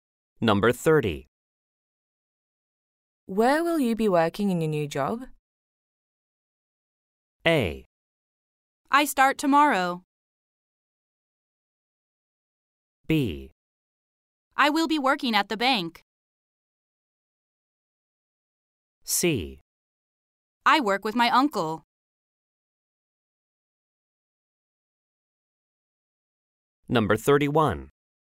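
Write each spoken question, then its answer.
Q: Where will you be working in your new job?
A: B: I will be working at the bank.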